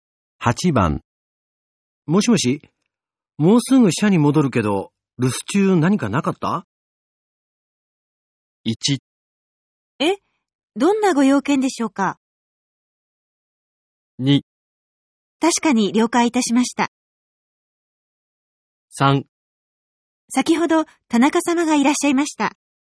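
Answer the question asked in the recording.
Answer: 3: 先ほど田中様がいらっしゃいました。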